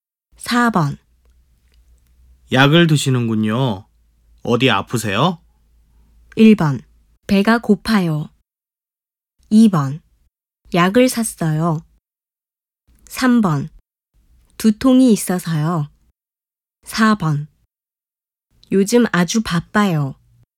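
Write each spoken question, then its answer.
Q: 약을 드시는군요. 어디 아프세요?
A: 3: 두통이 있어서요.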